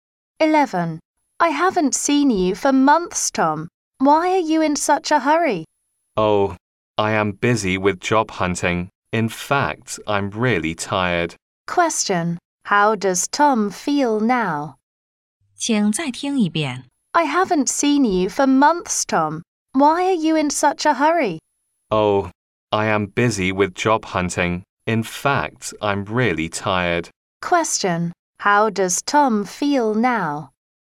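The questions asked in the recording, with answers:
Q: How does Tom feel now?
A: Tired.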